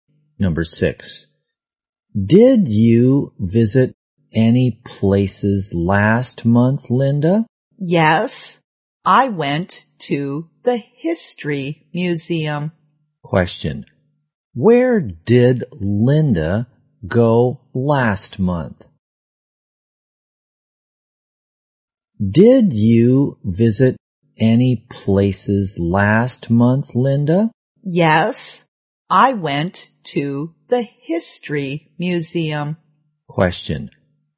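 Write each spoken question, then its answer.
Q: where did Linda go last month?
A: The History Museum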